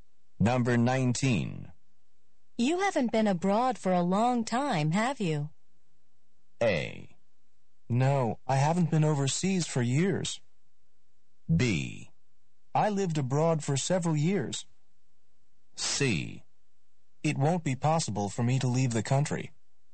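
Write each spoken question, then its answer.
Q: You haven't been abroad for a long time, have you?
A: A: No, I haven't been overseas for years.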